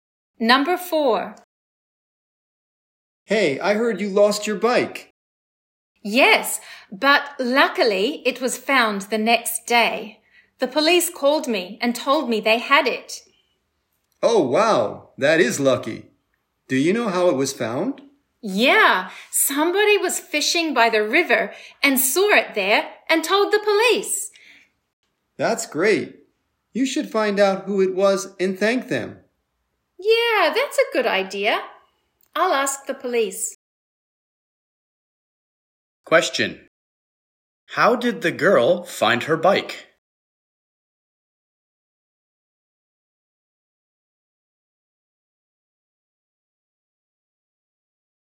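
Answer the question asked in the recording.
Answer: Someone fishing by the river saw it and told the police, who called her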